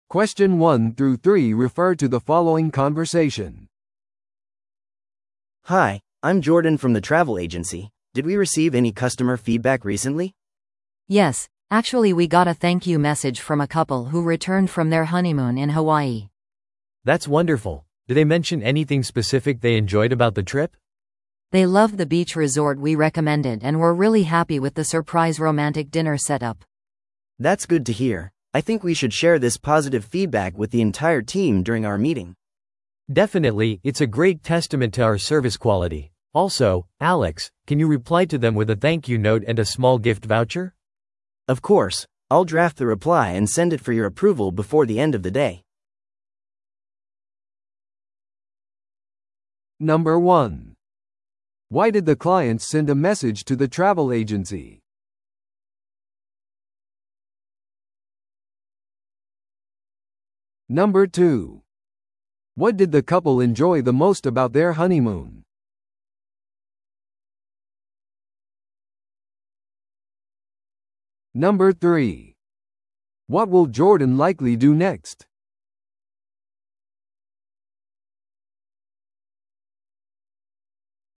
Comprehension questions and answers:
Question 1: Why did the clients send a message to the travel agency?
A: 感謝の気持ちを表すため。

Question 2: What did the couple enjoy the most about their honeymoon?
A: ビーチリゾートとロマンチックなディナー。

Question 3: What will Jordan likely do next?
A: フィードバックをチームミーティングで議論する。

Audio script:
A: Hi, I'm Jordan from the travel agency. Did we receive any customer feedback recently?
B: Yes, actually we got a thank-you message from a couple who returned from their honeymoon in Hawaii.
C: That's wonderful! Do they mention anything specific they enjoyed about the trip?
B: They loved the beach resort we recommended and were really happy with the surprise romantic dinner setup.
A: That's good to hear. I think we should share this positive feedback with the entire team during our meeting.
C: Definitely, it's a great testament to our service quality. Also, Alex, can you reply to them with a thank-you note and a small gift voucher?
A: Of course. I'll draft the reply and send it for your approval before the end of the day.